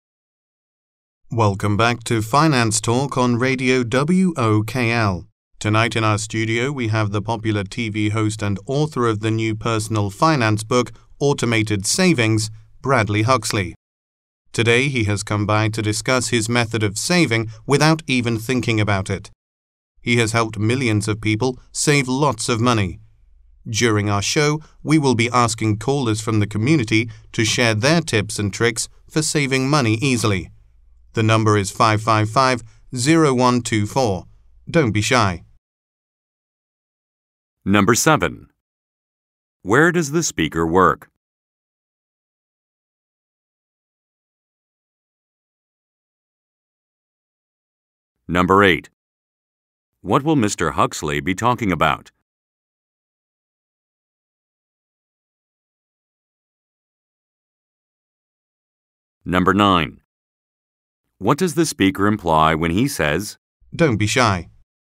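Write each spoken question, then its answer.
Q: Where does the speaker work?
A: At a radio station (Radio WOKL)

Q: What will Mr. Huxley be talking about?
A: His method of saving money without thinking about it

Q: What does the speaker imply when he says,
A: He wants listeners to call in and share their saving tips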